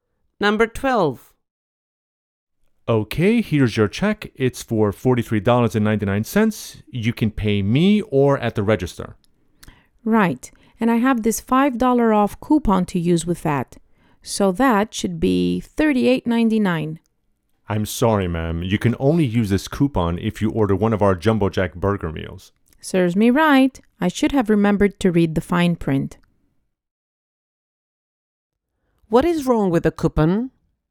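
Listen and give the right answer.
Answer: It is only valid with a Jumbo Jack burger meal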